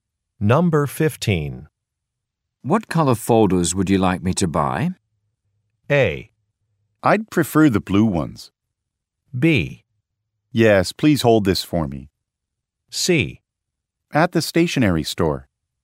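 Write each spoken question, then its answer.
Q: What color folders would you like me to buy?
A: A: I'd prefer the blue ones.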